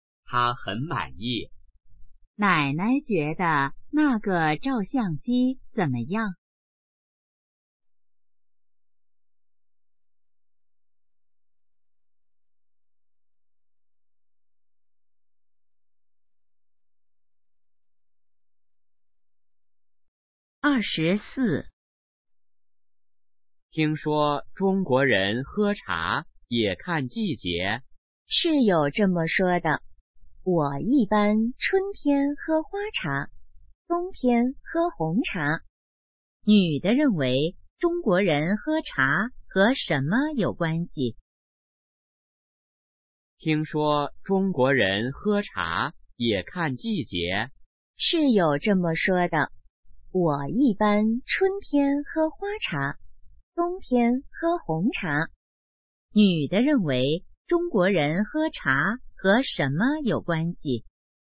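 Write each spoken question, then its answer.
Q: 女的认为中国人喝茶和什么有关系?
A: 季节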